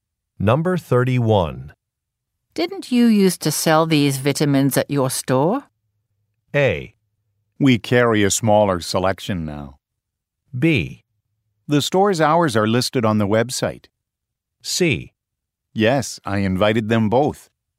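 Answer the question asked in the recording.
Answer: A: We carry a smaller selection now.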